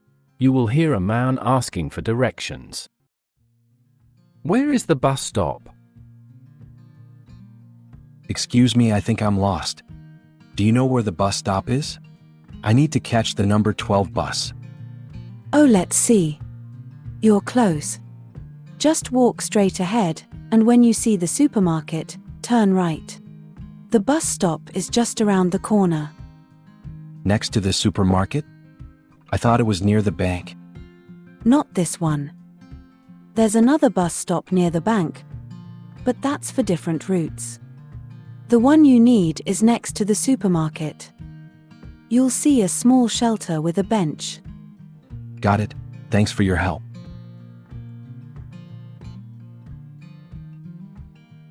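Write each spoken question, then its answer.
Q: Where is the bus stop?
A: next to the supermarket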